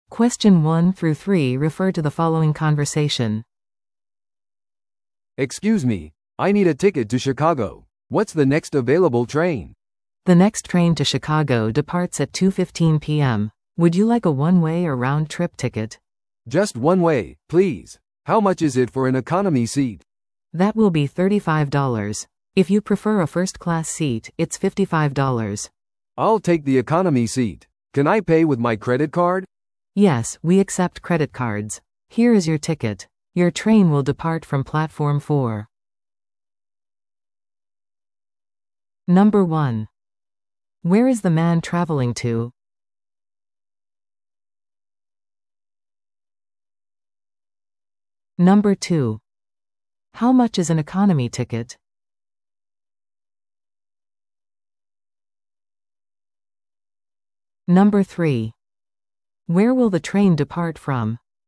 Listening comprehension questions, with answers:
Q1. Where is the man traveling to?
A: シカゴ

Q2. How much is an economy ticket?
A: 35ドル

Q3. Where will the train depart from?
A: 4番ホーム

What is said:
A: "Excuse me, I need a ticket to Chicago. What's the next available train?"
B: "The next train to Chicago departs at 2:15 PM. Would you like a one-way or round-trip ticket?"
A: "Just one way, please. How much is it for an economy seat?"
B: "That will be 35 dollars. If you prefer a first-class seat, it's 55 dollars."
A: "I'll take the economy seat. Can I pay with my credit card?"
B: "Yes, we accept credit cards. Here is your ticket. Your train will depart from Platform 4."